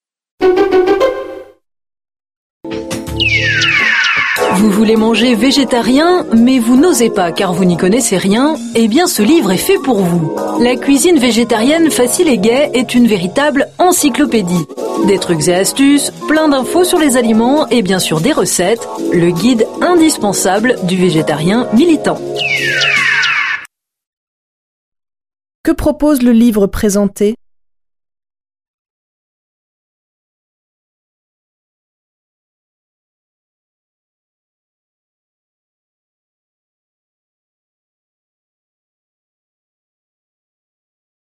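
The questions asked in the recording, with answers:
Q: Que propose le livre présenté ?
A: Des trucs et astuces, des infos sur les aliments et des recettes végétariennes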